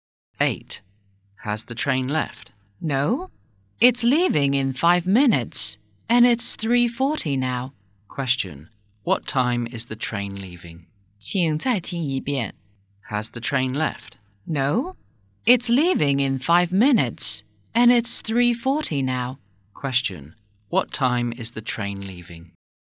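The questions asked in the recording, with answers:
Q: What time is the train leaving?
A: At 3:45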